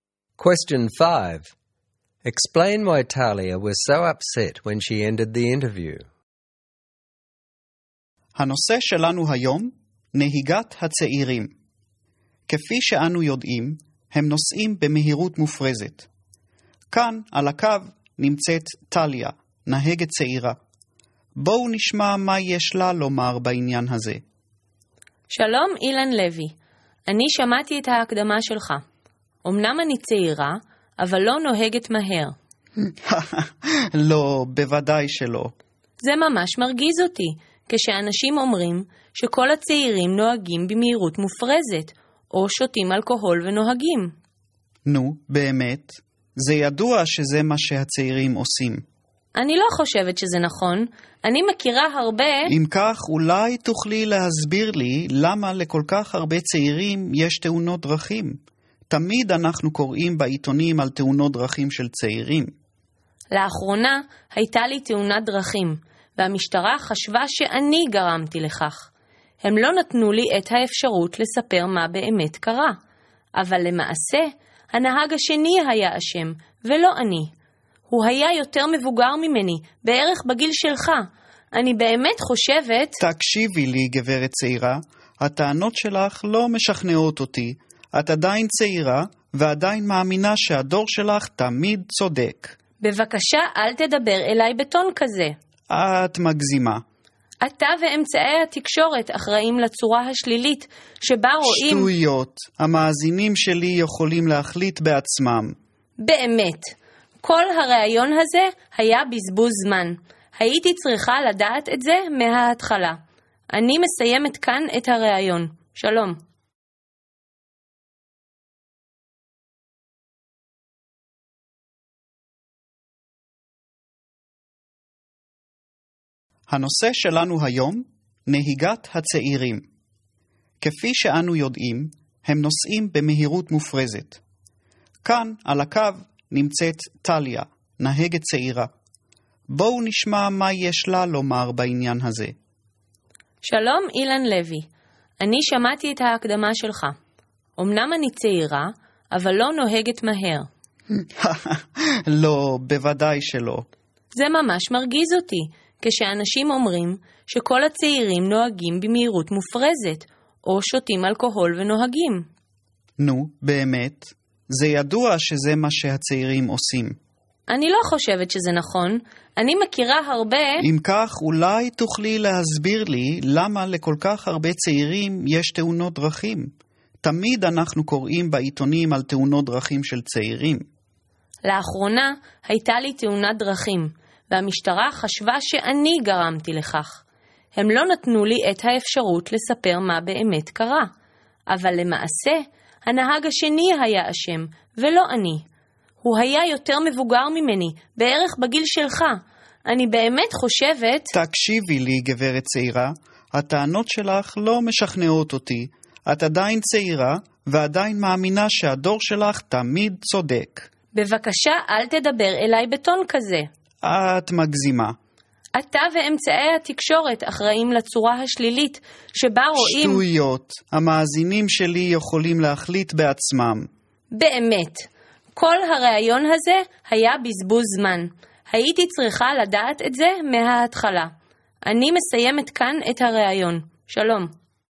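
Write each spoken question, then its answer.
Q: Explain why Talia was so upset when she ended the interview.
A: The host stereotyped young drivers as speeding and drinking. He kept interrupting her, dismissed her argument, and talked down to her as 'young lady'. He would not accept that the older driver caused her accident, and he blamed her generation. She felt the interview was a waste of time.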